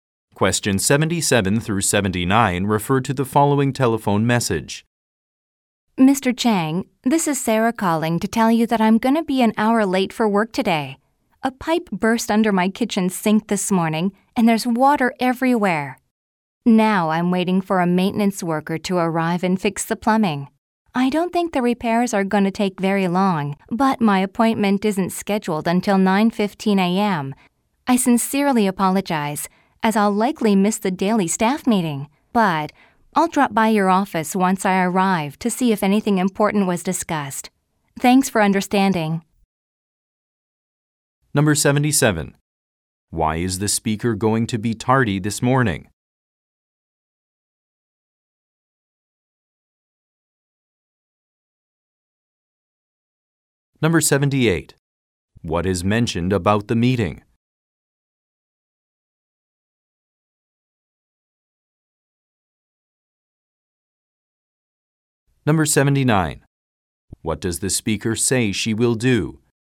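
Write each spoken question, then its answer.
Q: Why is the speaker going to be tardy this morning?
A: A pipe burst and she is waiting for a plumbing repair

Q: What is mentioned about the meeting?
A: It is a daily staff meeting that she will likely miss

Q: What does the speaker say she will do?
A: Stop by Mr. Chang's office when she arrives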